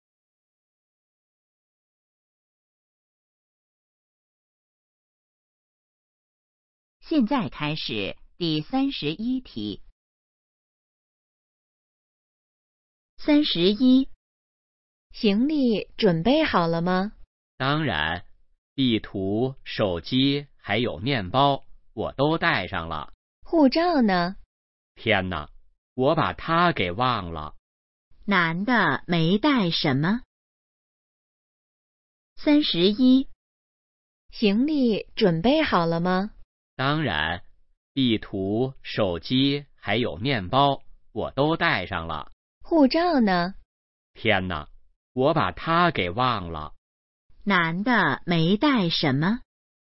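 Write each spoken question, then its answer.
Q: 男的没带什么?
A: 护照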